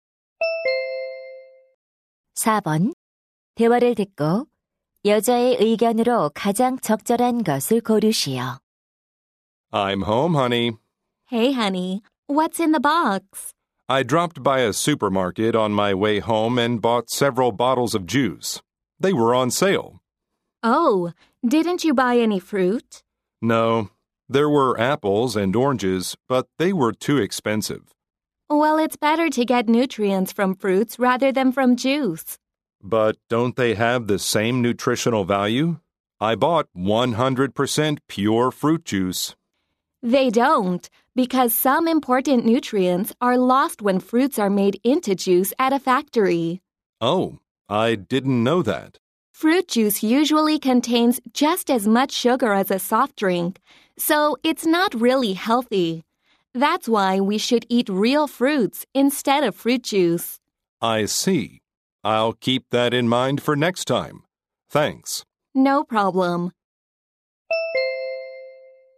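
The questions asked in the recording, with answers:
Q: 대화를 듣고 여자의 의견으로 가장 적절한 것을 고르시오.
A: 과일 주스보다 생과일을 먹는 것이 건강에 더 좋다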